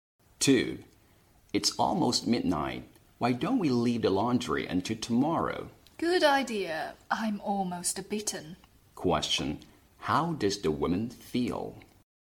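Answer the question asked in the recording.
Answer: Very tired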